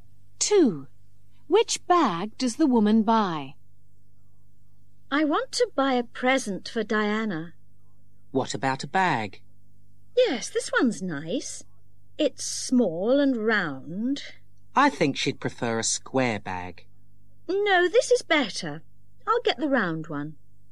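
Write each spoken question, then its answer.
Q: Which bag does the woman buy?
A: The small round one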